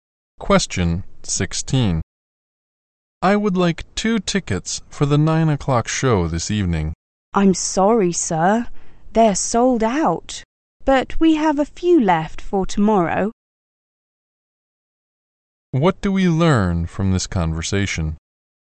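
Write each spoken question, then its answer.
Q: What do we learn from this conversation?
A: The tickets for the 9 o'clock show are sold out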